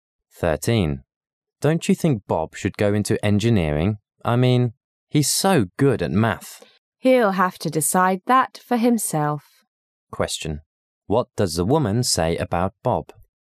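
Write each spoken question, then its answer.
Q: What does the woman say about Bob?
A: Bob should choose his career himself.

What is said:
[解析] M: Don't you think Bob should go into engineering--I mean, he's so good at math. W: He'll have to decide that for himself. Q: What does the woman say about Bob?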